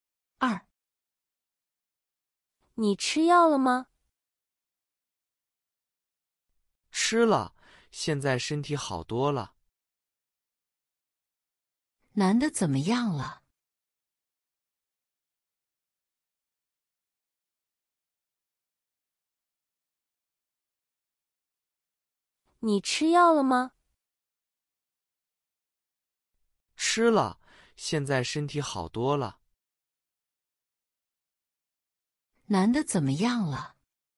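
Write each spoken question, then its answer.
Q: 男的怎么样了?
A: 吃了药,身体好多了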